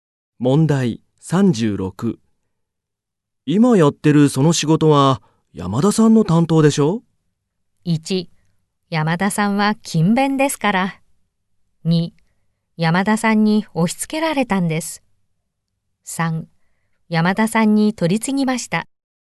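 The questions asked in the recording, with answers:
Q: 今やってるその仕事は山田さんの担当でしょう?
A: 2: 山田さんに押し付けられたんです。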